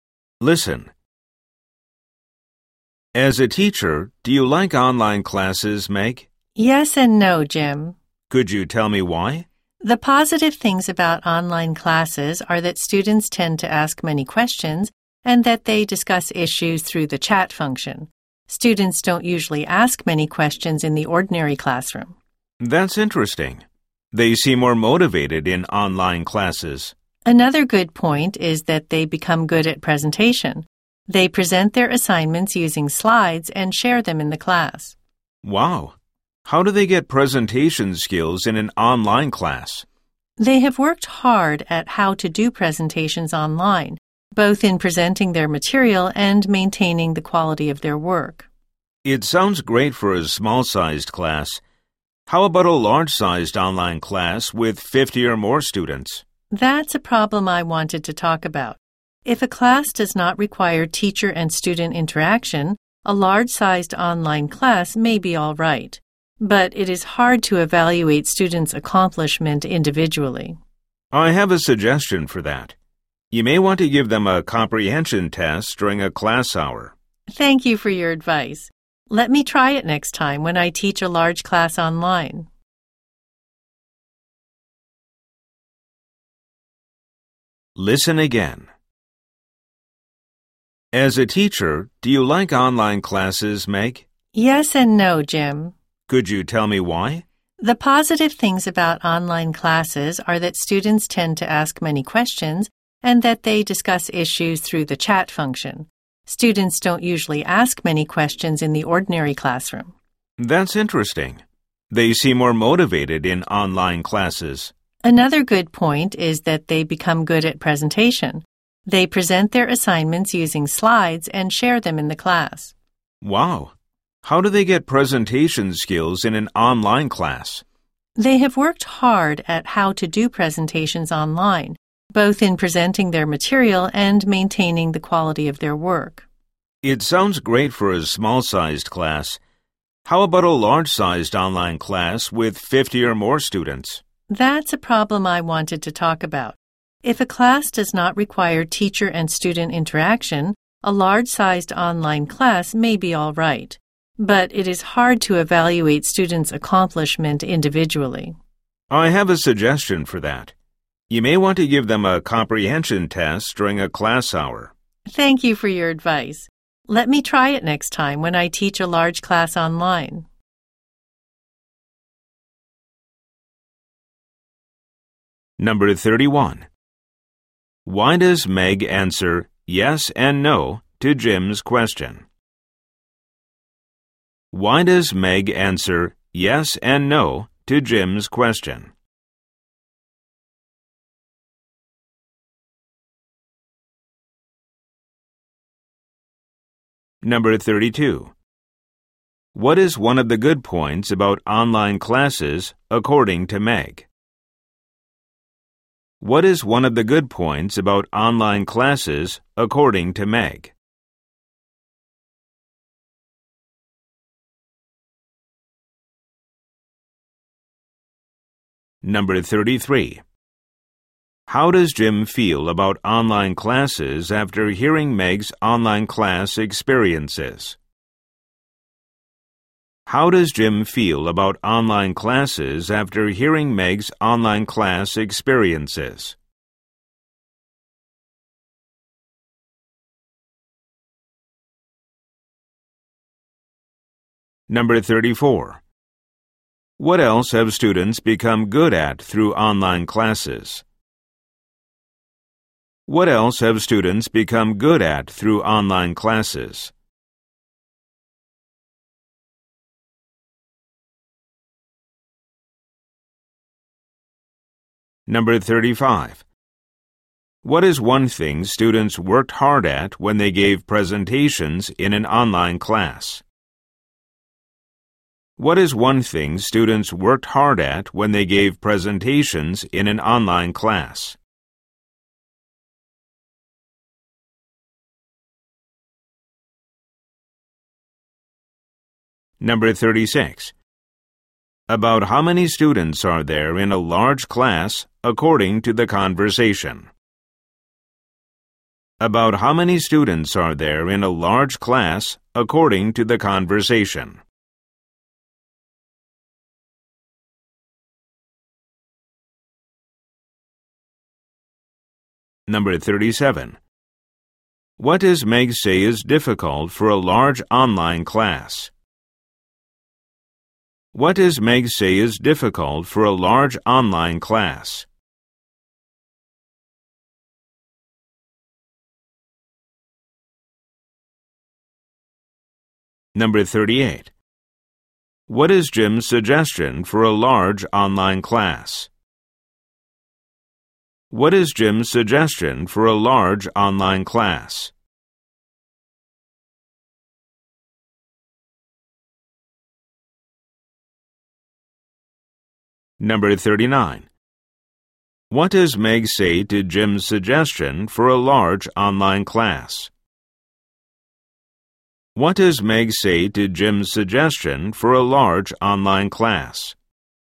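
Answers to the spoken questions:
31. Online classes have both good points and problems
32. Students ask many questions and discuss issues through the chat function
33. He finds it interesting; students seem more motivated
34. Presentations
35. Presenting their material and keeping the quality of their work
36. 50 or more
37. Assessing each student's work individually
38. Give a comprehension test during class
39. She thanks him and will try it next time she teaches a large class online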